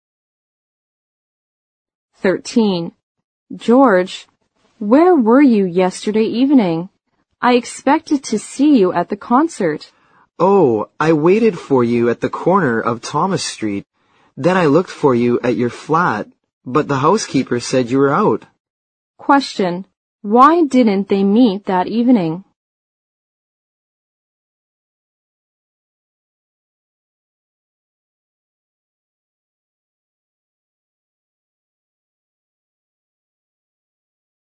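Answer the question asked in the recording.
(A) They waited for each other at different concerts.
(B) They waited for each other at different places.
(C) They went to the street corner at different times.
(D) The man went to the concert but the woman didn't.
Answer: (B) They waited for each other at different places.

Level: 六级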